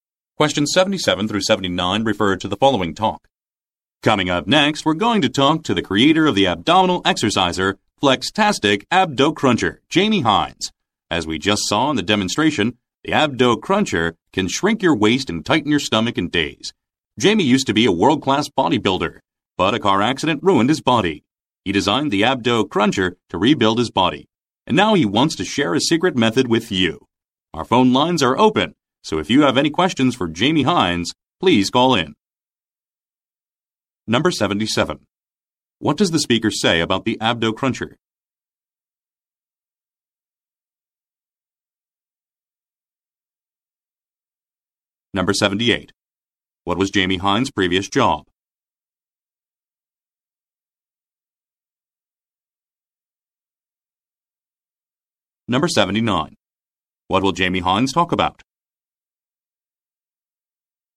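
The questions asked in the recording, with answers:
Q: What does the speaker say about the Abdo Cruncher?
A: It can shrink your waist and tighten your stomach in days

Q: What was Jamie Hines' previous job?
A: Bodybuilder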